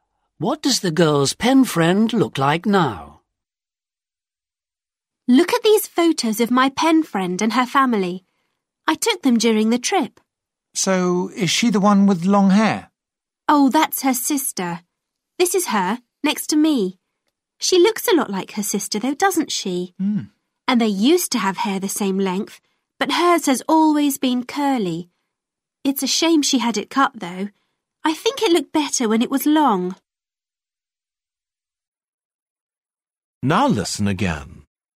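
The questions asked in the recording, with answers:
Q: What does the girl's pen friend look like now?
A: She has short, curly hair.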